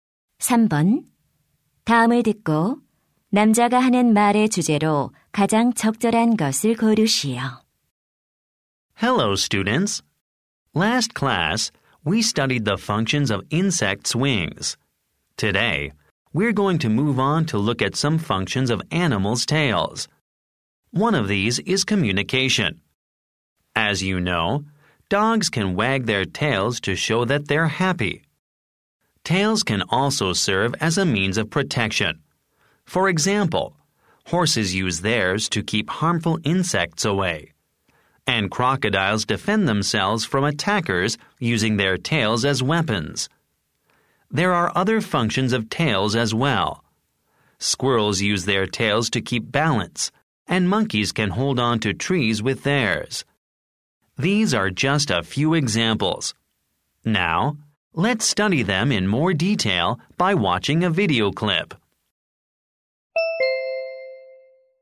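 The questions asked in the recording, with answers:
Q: 다음을 듣고 남자가 하는 말의 주제로 가장 적절한 것을 고르시오.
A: 동물 꼬리의 기능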